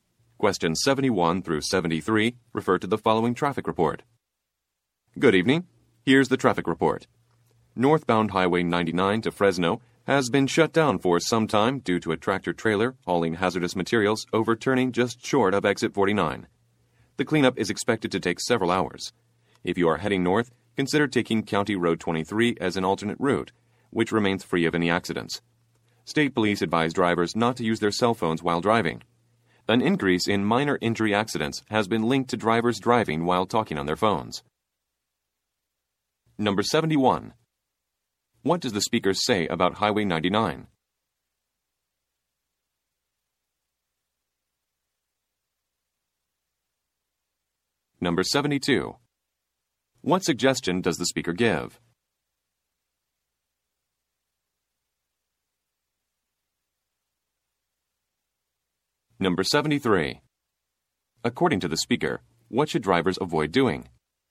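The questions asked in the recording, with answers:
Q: What does the speaker say about Highway 99?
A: Northbound lanes are shut down due to an overturned truck

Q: What suggestion does the speaker give?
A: Take County Road 23 as an alternate route

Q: According to the speaker, what should drivers avoid doing?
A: Using cell phones while driving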